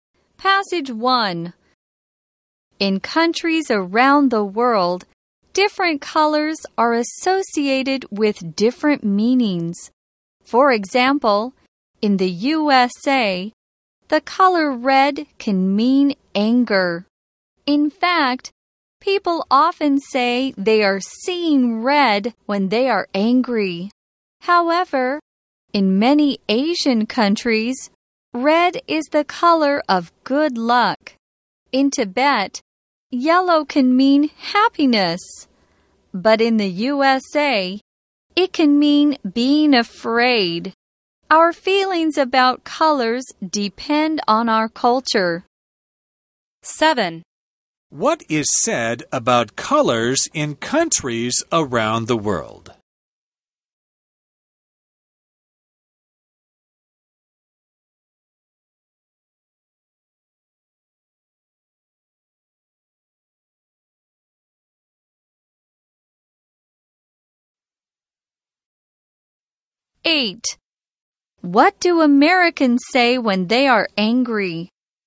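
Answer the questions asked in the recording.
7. Different colors are associated with different meanings
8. They are seeing red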